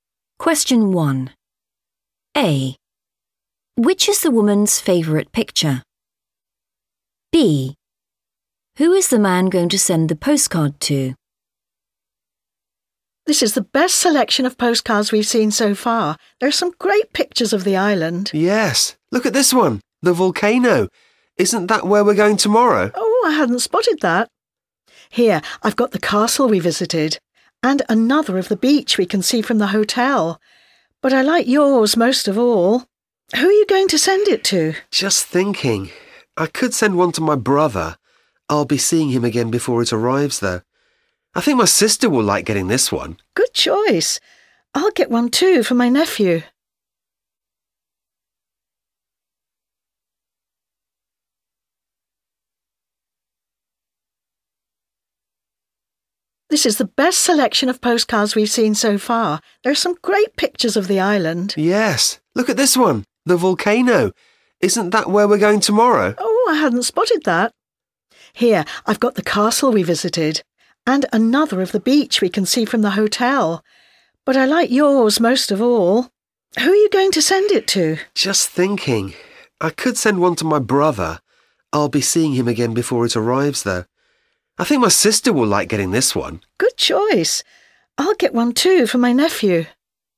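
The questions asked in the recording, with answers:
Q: Who is the man going to send the postcard to?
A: his sister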